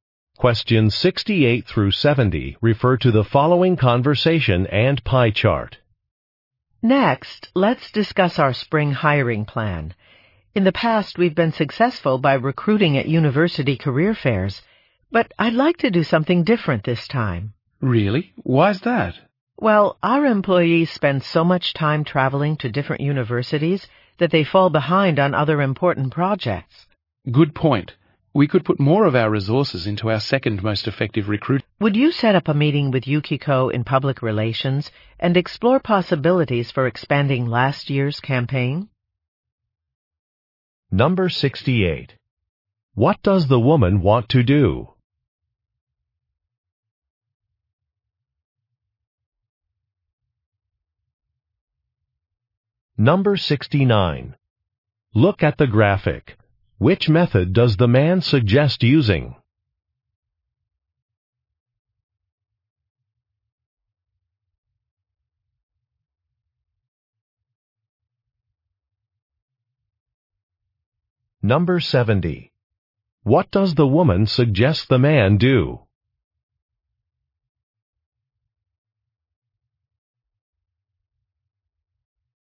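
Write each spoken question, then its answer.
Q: What does the woman want to do?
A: Change the recruiting method instead of university career fairs

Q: What does the woman suggest the man do?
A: Set up a meeting with Yukiko in public relations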